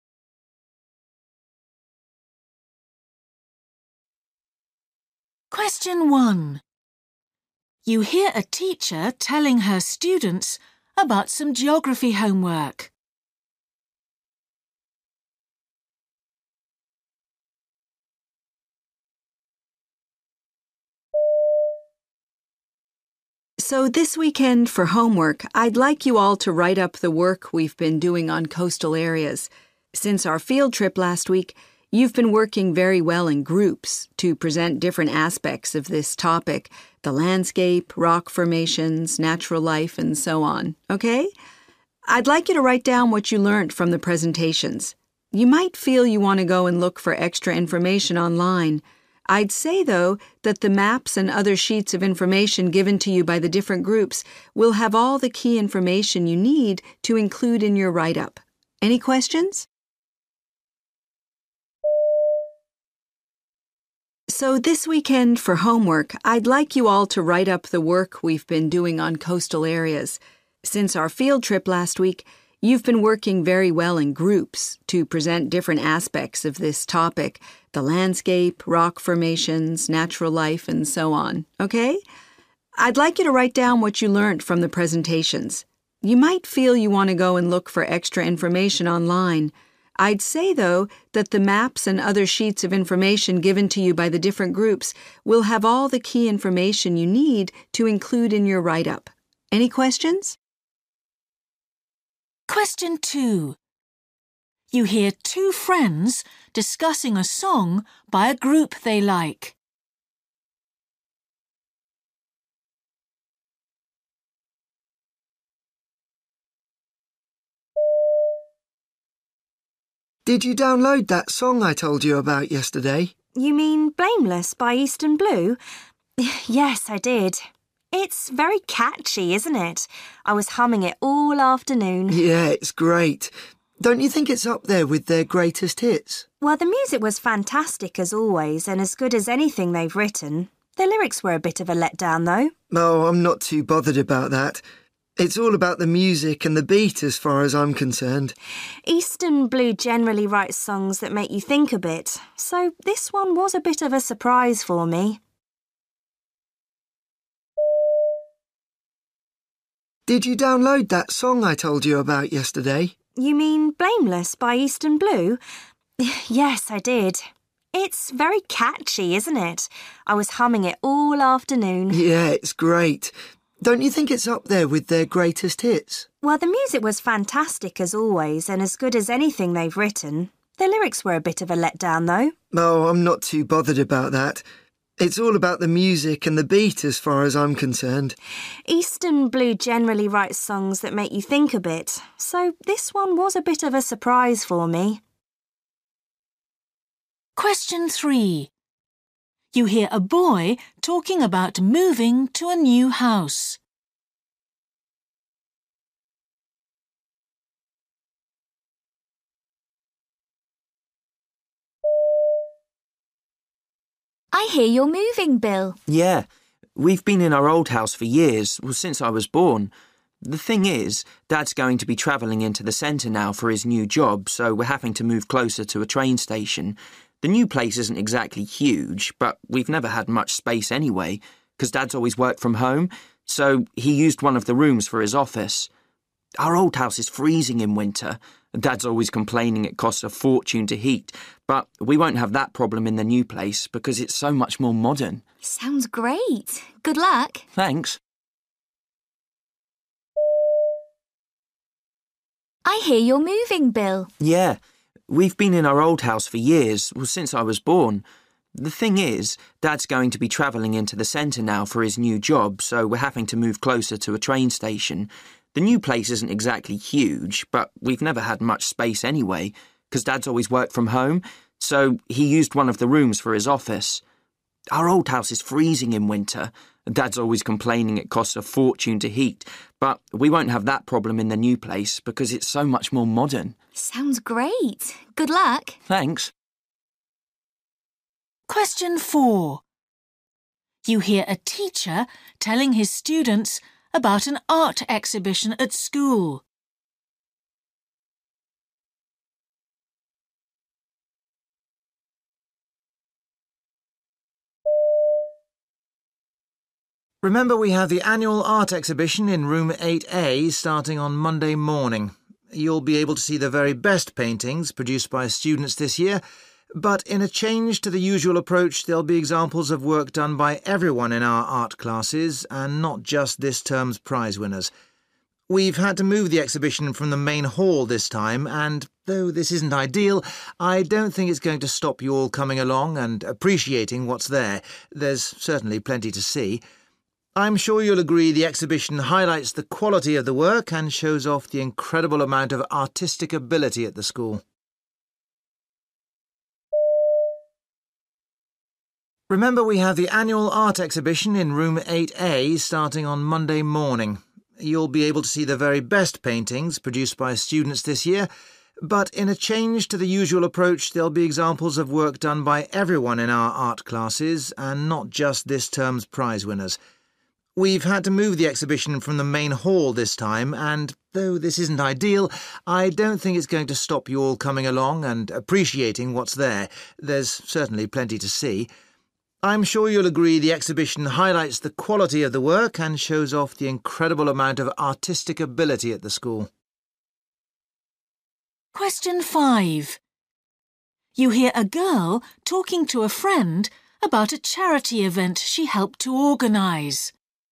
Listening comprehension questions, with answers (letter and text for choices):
For questions 1-8, choose the best answer A, B or C.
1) You hear a teacher telling her students about some geography homework. The teacher recommends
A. visiting local sites.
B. referring to handouts.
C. consulting websites.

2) You hear two friends discussing a song by a group they like. What is the girl's opinion of it?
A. It's typical of the work that the group does.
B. It's less impressive than she expected.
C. It's one of the best songs the group has ever done.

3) You hear a boy talking about moving to a new house. He thinks the main advantage for his family will be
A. having more space.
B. saving money on bills.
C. being nearer to the city centre.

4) You hear a teacher telling his students about an art exhibition at school. What is he doing?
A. explaining the importance of developing artistic talent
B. saying why the venue has had to be changed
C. emphasising the wide range of artwork on display.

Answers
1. B. referring to handouts.
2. B. It's less impressive than she expected.
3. B. saving money on bills.
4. C. emphasising the wide range of artwork on display.

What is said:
1
Woman: So this weekend for homework I'd like you all to write up the work we've been doing on coastal areas. Since our field trip last week, you've been working very well in groups to present different aspects of this topic – the landscape, rock formations, natural life and so on. I'd like you to write down what you learnt from the presentations – you might feel you want to go and look for extra information online – I'd say, though, that the maps and other sheets of information given to you by the different groups will have all the key information you need to include in your write-up. Any questions?
Boy: Did you download that song I told you about yesterday?
Girl: You mean Blameless by Eastern Blue? Yes I did. It's very catchy, isn't it? I was humming it all afternoon!
Boy: Yeah, it's great. Don't you think it's up there with their greatest hits?
Girl: Well, the music was fantastic as always and as good as anything they've written – the lyrics were a bit of a let-down though.
Boy: Oh, I'm not too bothered about that. It's all about the music and the beat as far as I'm concerned.
Girl: Eastern Blue generally write songs that make you think a bit. So this one was a bit of a surprise for me.
Woman: I hear you're moving, Bill!
Boy: Yeah, we've been in our old house for years – since I was born. The thing is Dad's going to be travelling into the centre now for his new job, so we're having to move closer to a train station. The new place isn't exactly huge but we've never had much space anyway cos Dad's always worked from home – so he used one of the rooms for his office. Our old house is freezing in winter – Dad's always complaining it costs a fortune to heat, but we won't have that problem in the new place because it's so much more modern.
Woman: Sounds great – good luck!
Boy: Thanks!
Man: Remember we have the annual art exhibition in room 8A starting on Monday morning. You'll be able to see the very best paintings produced by students this year, but in a change to the usual approach, there'll be examples of work done by everyone in our art classes and not just this term's prize-winners. We've had to move the exhibition from the main hall this time and, though this isn't ideal. I don't think it's going to stop you all coming along and appreciating what's there – there's certainly plenty to see. I'm sure you'll agree the exhibition highlights the quality of the work and shows off the incredible amount of artistic ability at the school!
5